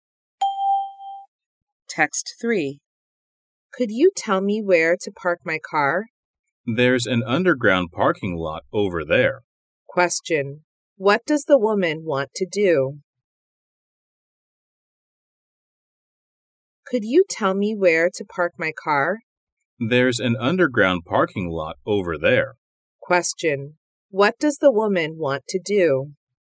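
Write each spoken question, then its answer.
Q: What does the woman want to do?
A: Park her car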